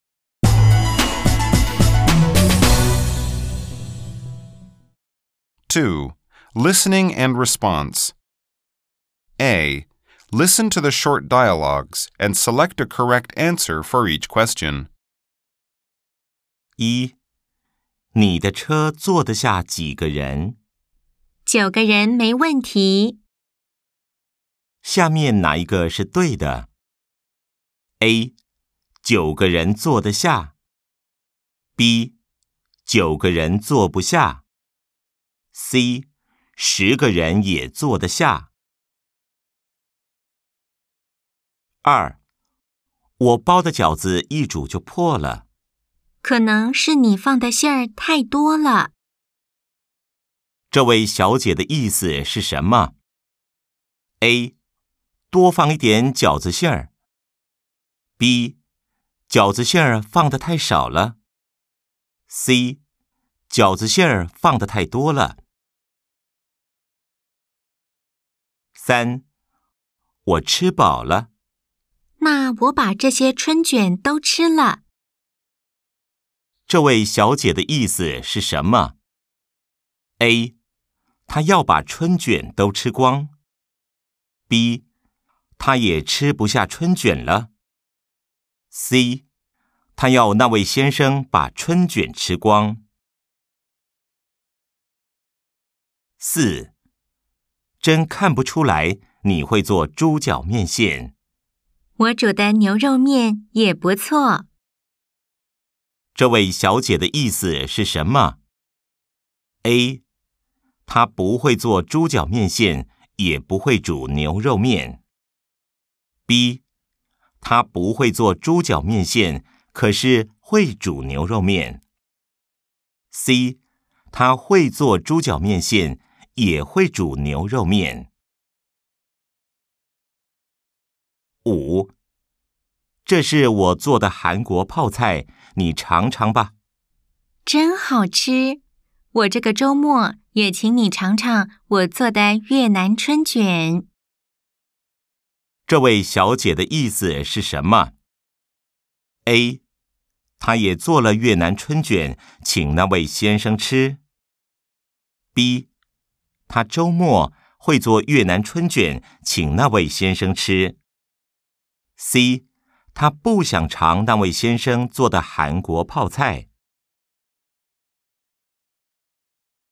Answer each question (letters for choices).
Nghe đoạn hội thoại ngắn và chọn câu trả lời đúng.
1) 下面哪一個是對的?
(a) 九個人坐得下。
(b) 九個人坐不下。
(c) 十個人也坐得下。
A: a